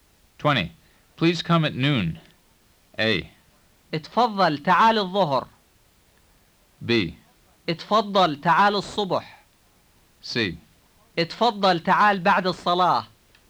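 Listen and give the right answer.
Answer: A: اتفضل تعال الظهر.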